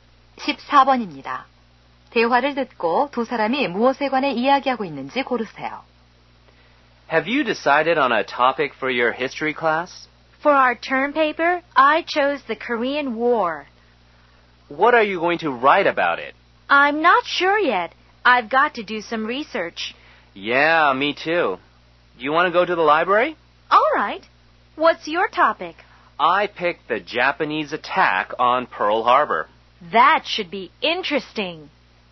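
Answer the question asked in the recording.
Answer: 역사 수업 기말 보고서 주제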